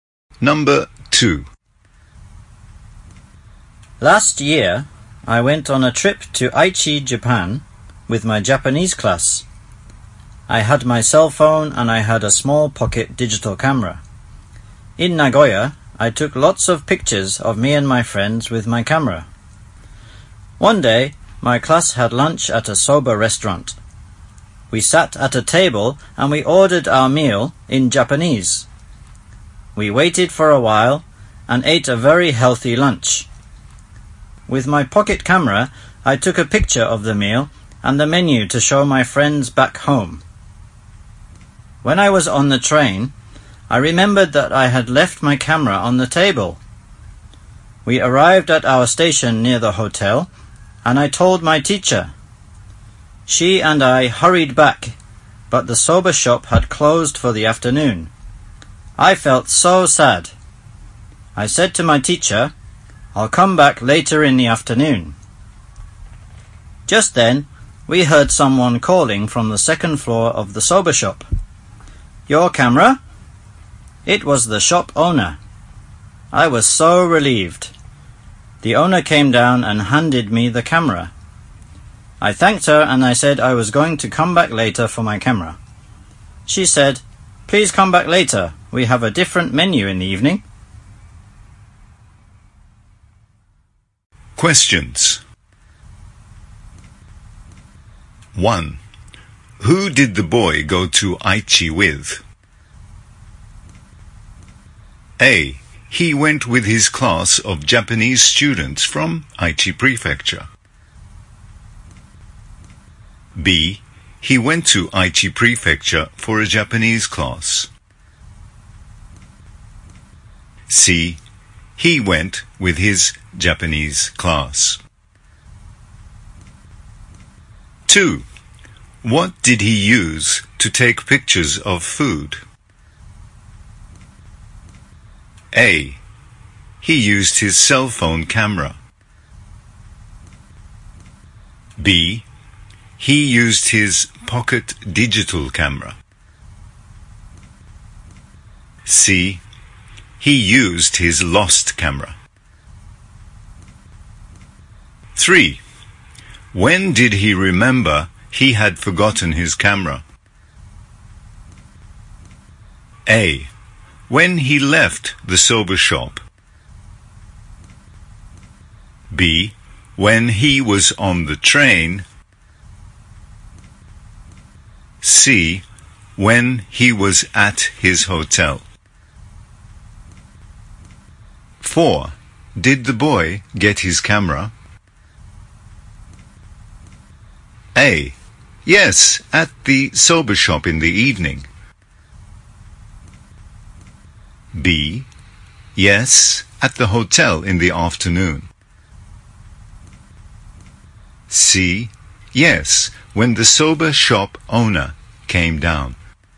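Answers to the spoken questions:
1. C: He went with his Japanese class.
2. B: He used his pocket digital camera.
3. B: When he was on the train.
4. C: Yes, when the soba shop owner came down.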